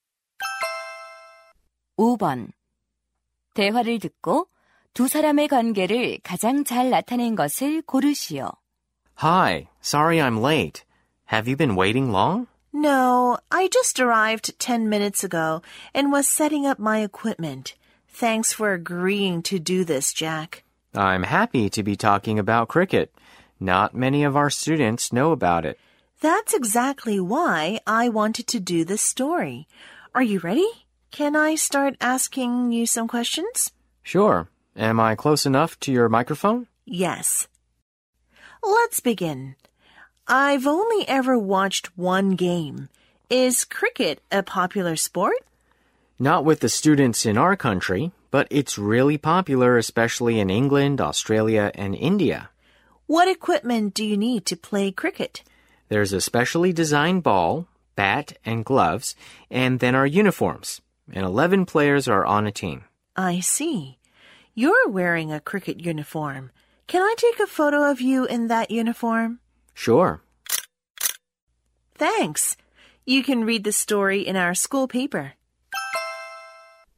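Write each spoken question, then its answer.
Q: 대화를 듣고 두 사람의 관계를 가장 잘 나타낸 것을 고르시오.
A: 학교 신문 기자 – 크리켓 선수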